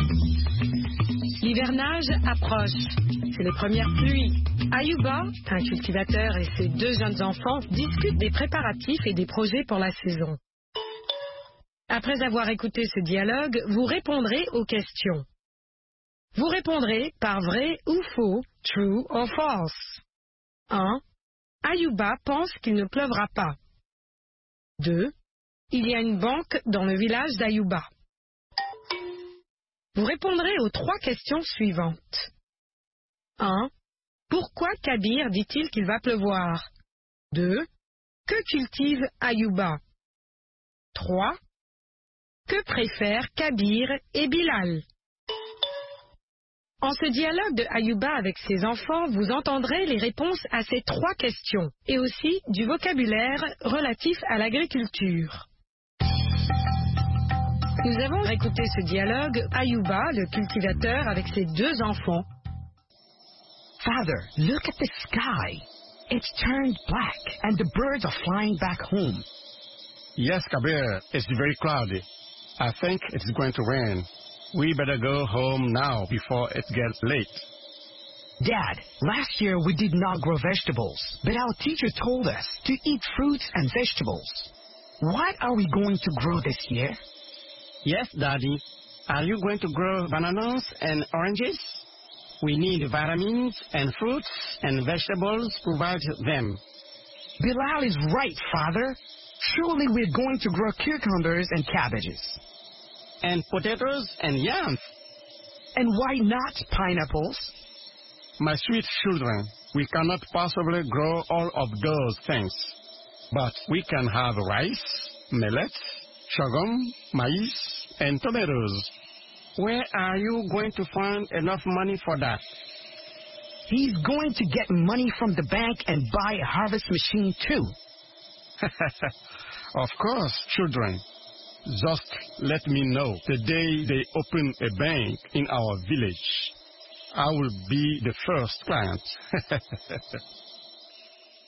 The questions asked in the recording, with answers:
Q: Ayuba pense qu'il ne pleuvra pas.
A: L'énoncé 1 est faux.

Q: Il y a une banque dans le village d'Ayuba.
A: L'énoncé 2 est faux.

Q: Pourquoi Kabir dit-il qu'il va pleuvoir?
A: Parce que le ciel est nuageux.

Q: Que cultive Ayuba?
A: Ayuba cultive du riz, du mil, du sorgho, du maïs et de la tomate.

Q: Que préfèrent Kabir et Bilal?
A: Ils préfèrent les légumes et des fruits.